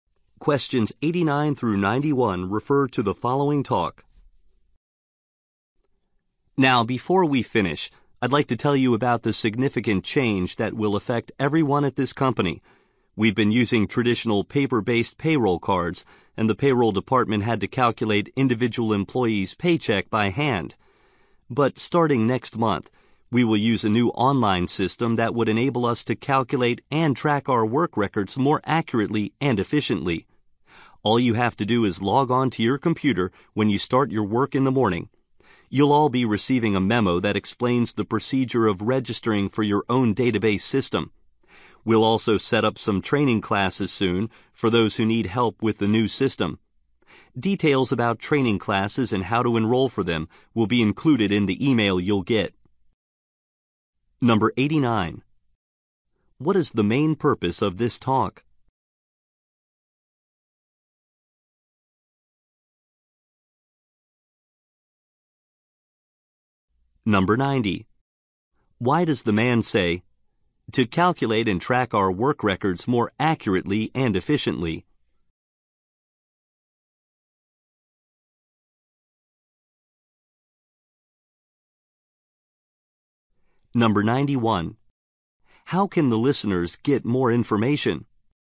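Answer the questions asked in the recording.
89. To announce a new online payroll system
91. By reading the memo/email they will receive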